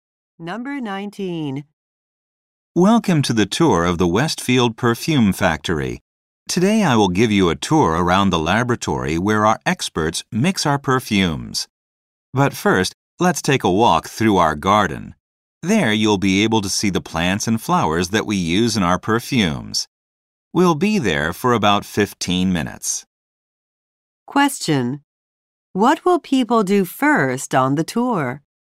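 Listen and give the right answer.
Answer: Take a walk through the garden.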